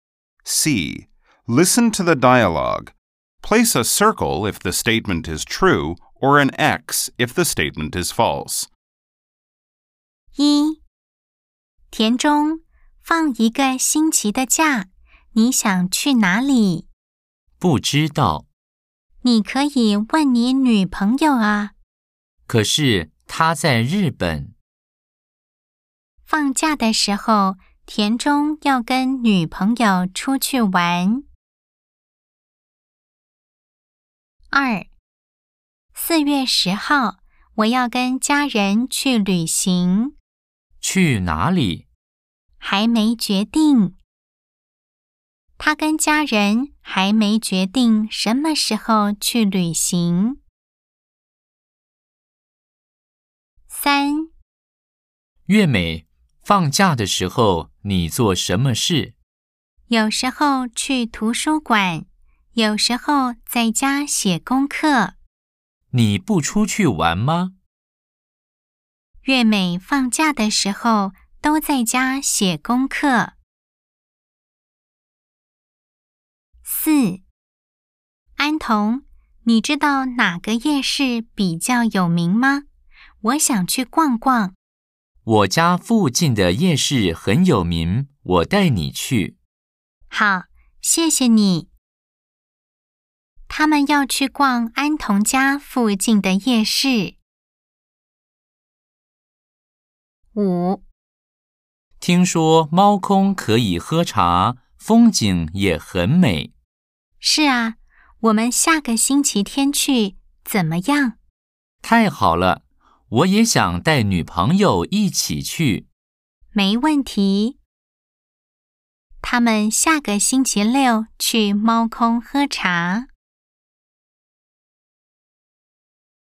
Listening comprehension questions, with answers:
C. Nghe đoạn hội thoại. Đánh dấu ⭕ nếu đúng, ✖ nếu sai.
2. 她跟家人還沒決定什麼時候去旅行。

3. 月美放假的時候都在家寫功課。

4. 他們要去連安同家附近的夜市。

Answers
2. O
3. X
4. O